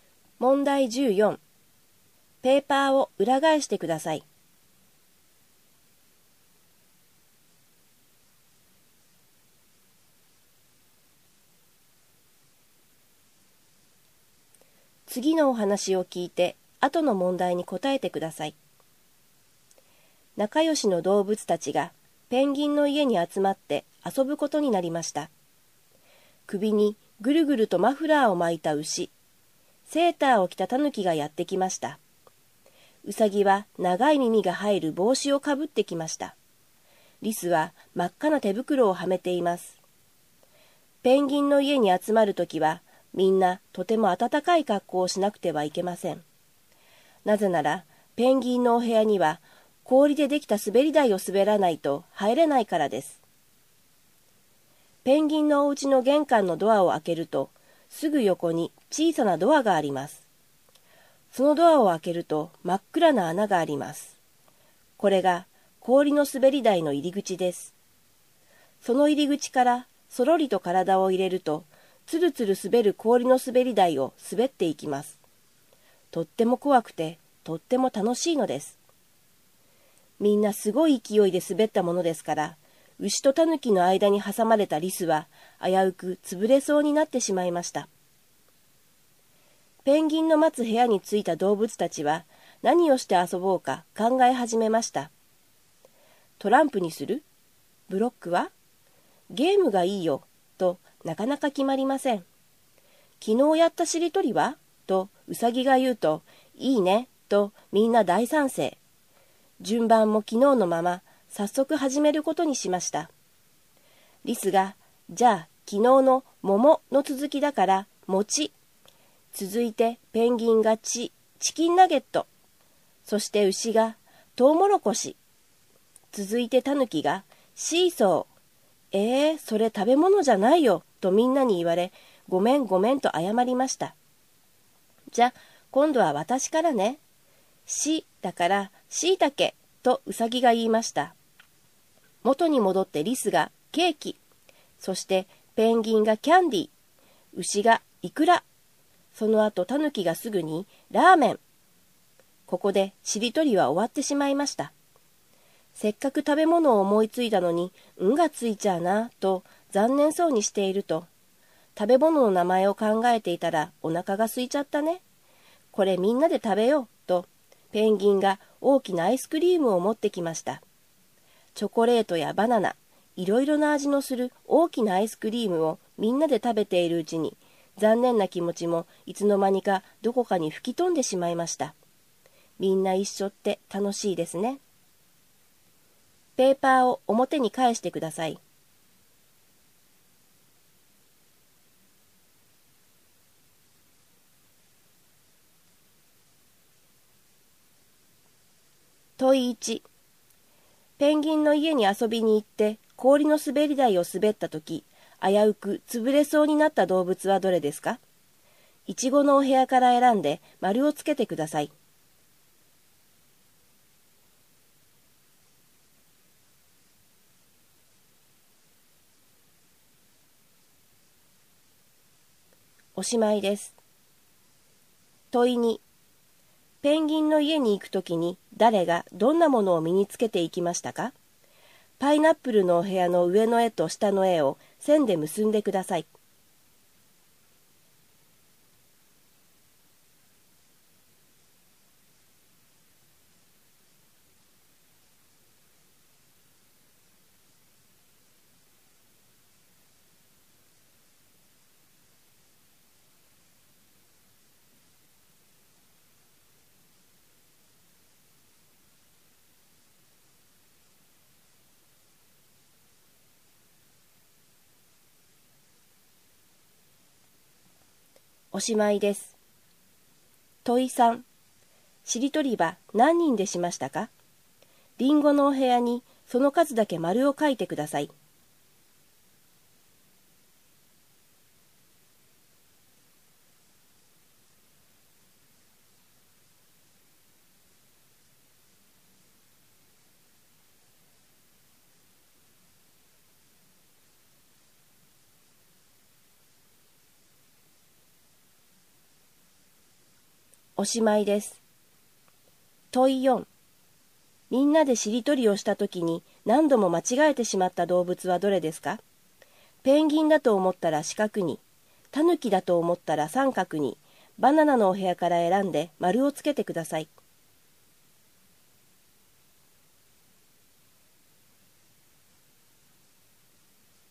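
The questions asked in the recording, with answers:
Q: ペンギンの家に遊びに行って氷の滑り台を滑ったとき、危うく潰れそうになった動物はどれですか?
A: リス

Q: しりとりは何人でしましたか?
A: 5人

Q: みんなでしりとりをしたときに何度も間違えてしまった動物はどれですか?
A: タヌキ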